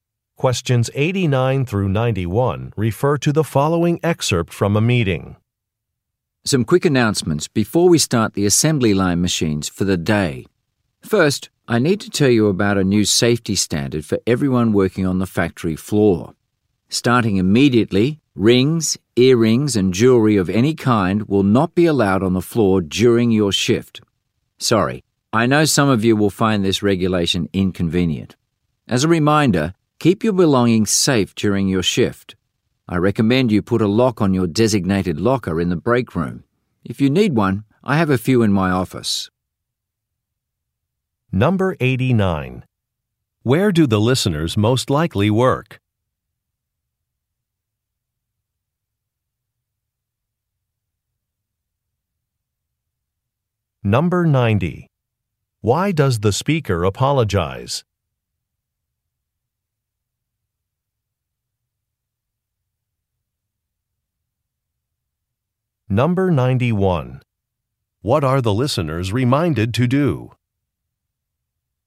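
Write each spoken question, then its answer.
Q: Where do the listeners most likely work?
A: In a factory

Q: Why does the speaker apologize?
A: The new no-jewelry rule is inconvenient

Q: What are the listeners reminded to do?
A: Lock their lockers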